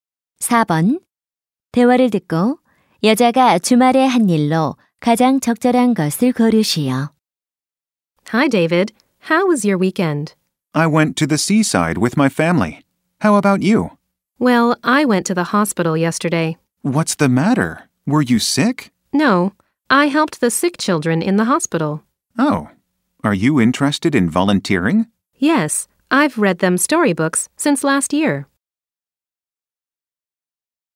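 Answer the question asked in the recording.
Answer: 병원에서 아픈 아이들을 돕는 봉사활동(책 읽어주기)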